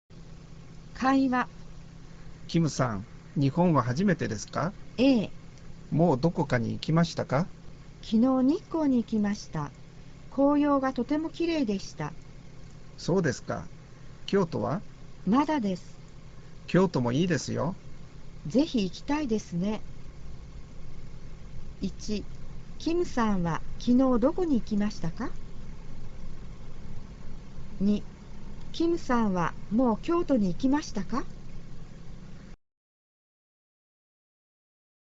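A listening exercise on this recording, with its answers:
Phần 2: Nghe đoạn hội thoại sau và trả lời câu hỏi bên dưới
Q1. キムさんは昨日きのうどこに行いきましたか。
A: 日光

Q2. キムさんはもう京都きょうとに行いきましたか。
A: いいえ、まだです。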